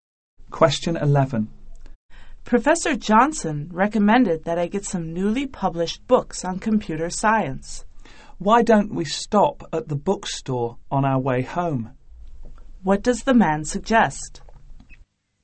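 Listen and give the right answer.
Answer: Stopping at the bookstore on the way home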